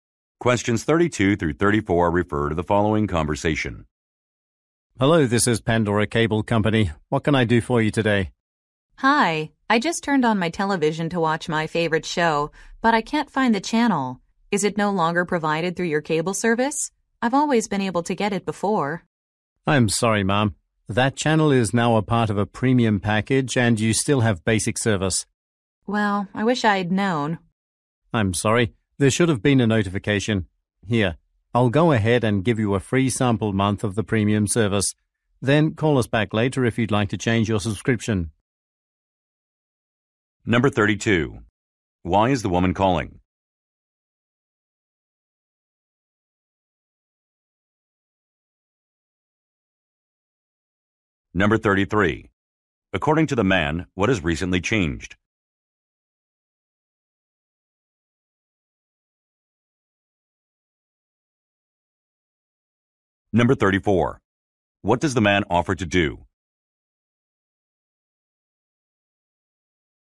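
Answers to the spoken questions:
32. She can't find a TV channel she usually watches.
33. The channel is now part of a premium package.
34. Give her a free sample month of premium service.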